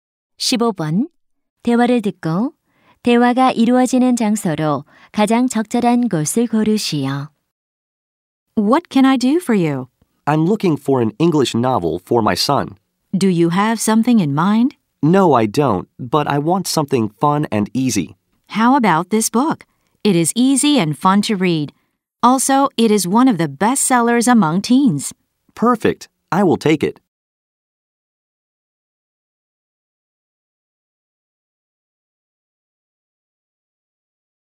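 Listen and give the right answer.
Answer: 서점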